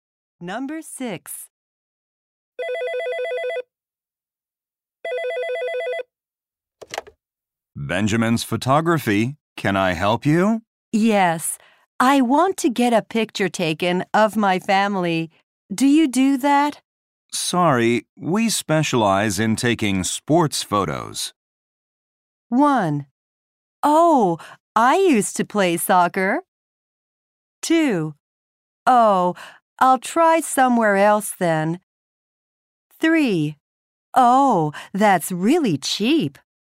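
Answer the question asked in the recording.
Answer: 2: Oh, I'll try somewhere else then.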